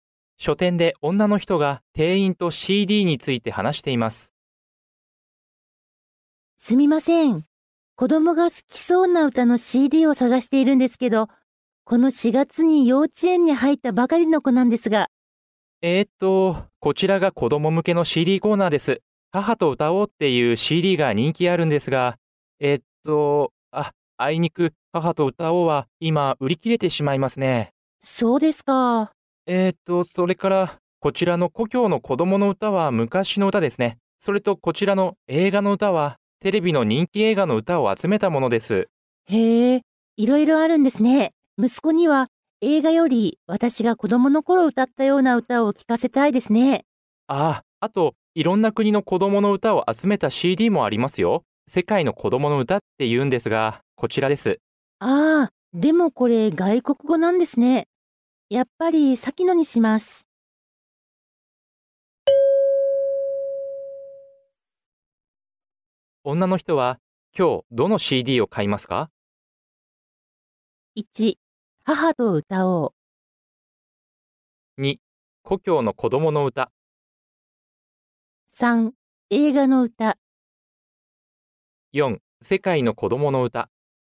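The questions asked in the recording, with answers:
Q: 女の人は、今日どの CD を買いますか?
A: 2: 故郷の子供の歌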